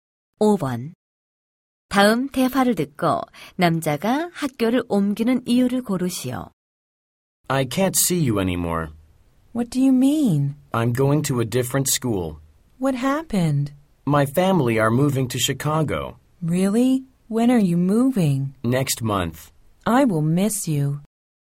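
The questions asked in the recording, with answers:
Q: 다음 대화를 듣고 남자가 학교를 옮기는 이유를 고르시오.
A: 가족이 시카고로 이사해서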